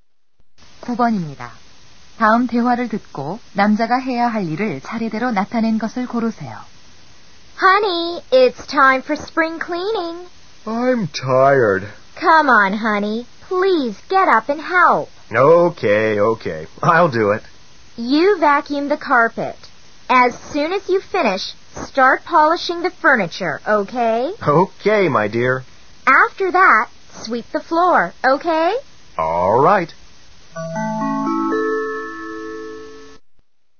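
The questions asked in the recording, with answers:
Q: 다음 대화를 듣고 남자가 해야 할 일을 차례대로 나타낸 것을 고르세요.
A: 카펫 청소기 돌리기 → 가구 닦기 → 바닥 쓸기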